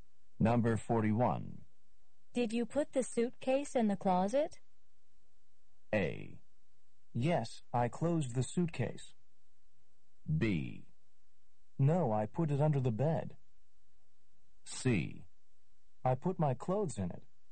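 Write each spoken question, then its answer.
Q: Did you put the suitcase in the closet?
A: B: No, I put it under the bed.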